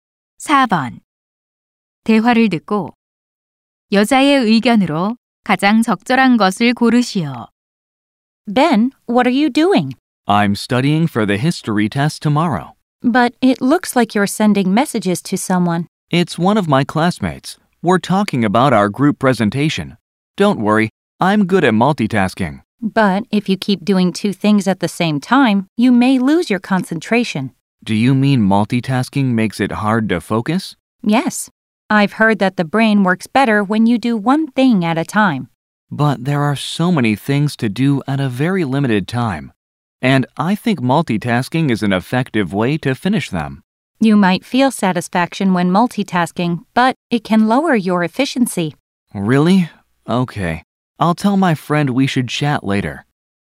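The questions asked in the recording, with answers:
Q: 대화를 듣고 여자의 의견으로 가장 적절한 것을 고르시오.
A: 멀티태스킹은 집중력과 효율성을 떨어뜨린다.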